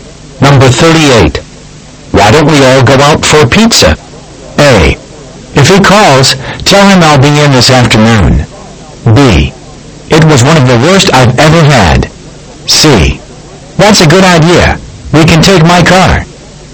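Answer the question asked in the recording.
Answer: C: That's a good idea. We can take my car.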